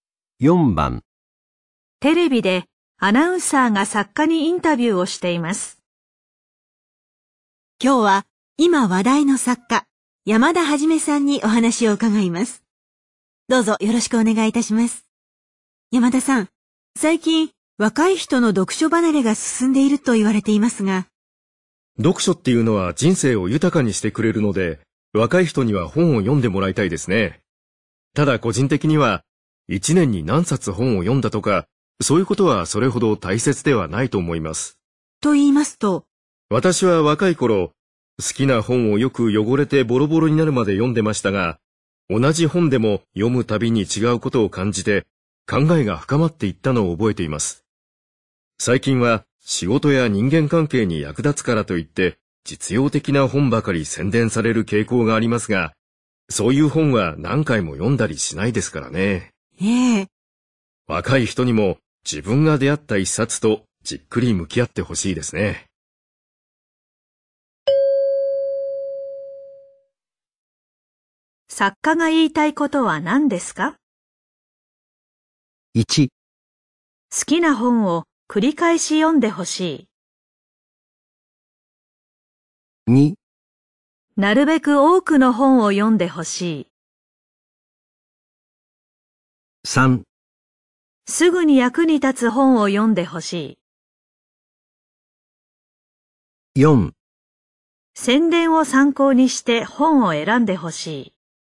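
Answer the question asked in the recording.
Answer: 1: 好きな本を繰り返し読んでほしい。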